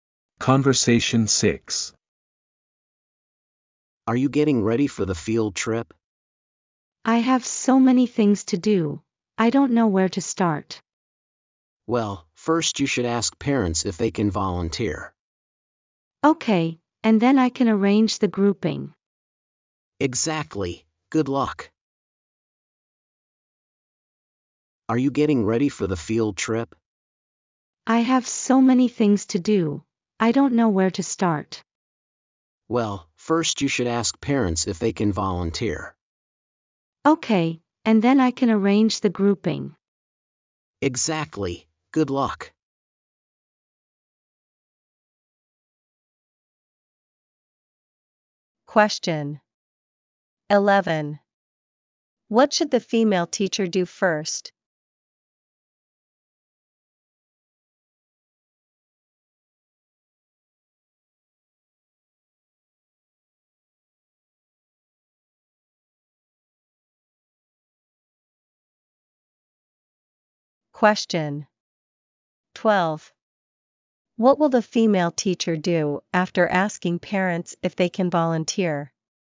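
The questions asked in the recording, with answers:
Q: What should the female teacher do first?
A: Ask parents if they can volunteer

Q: What will the female teacher do after asking parents if they can volunteer?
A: Arrange the grouping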